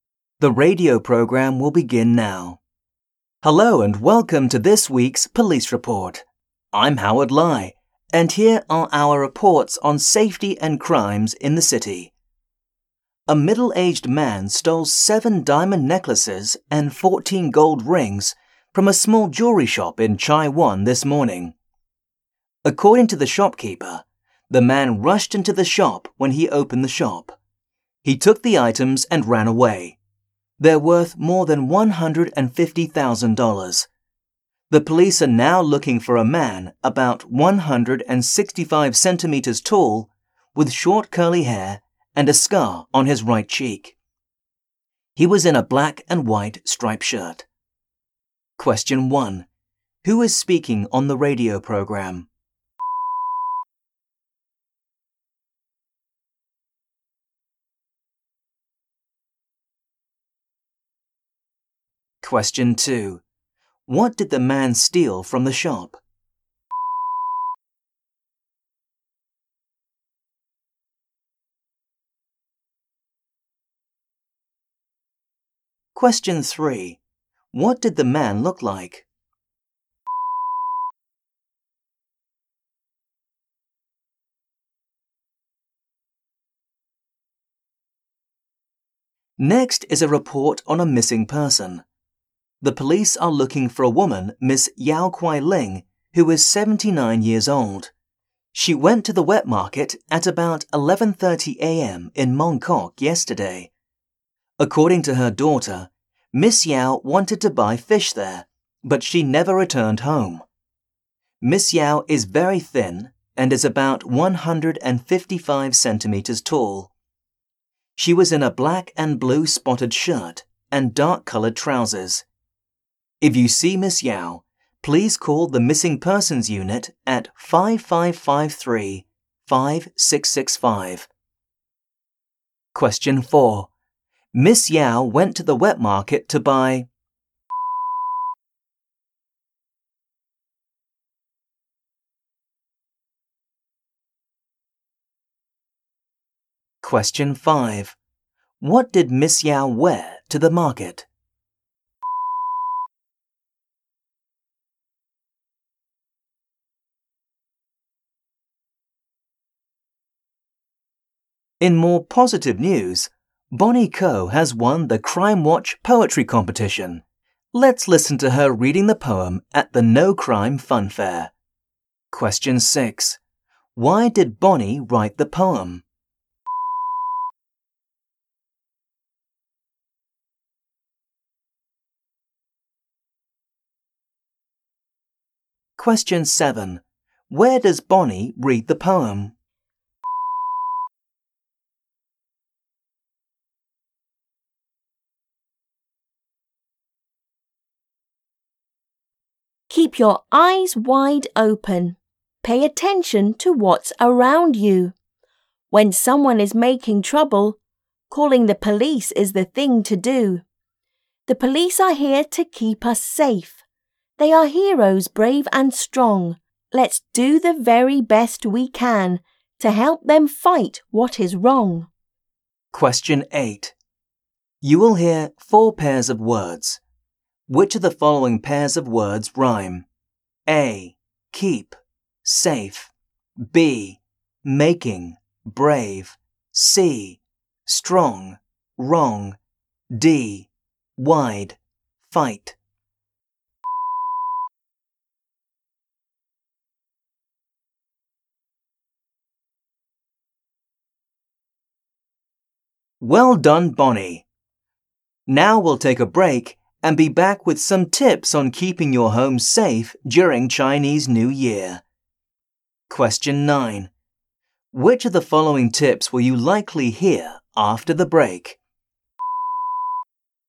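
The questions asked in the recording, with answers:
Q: Who is speaking on the radio program?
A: Howard Lai

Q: What did the man steal from the shop?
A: 7 diamond necklaces and 14 gold rings

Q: What did the man look like?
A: About 165 cm tall, short curly hair, a scar on his right cheek, black and white striped shirt

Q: Miss Yao went to the wet market to buy.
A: fish

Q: What did Miss Yao wear to the market?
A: A black and blue spotted shirt and dark-colored trousers

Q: Where does Bonnie read the poem?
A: At the No Crime Fun Fair

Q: You will hear 4 pairs of words. Which of the following pairs of words rhyme?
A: C: strong, wrong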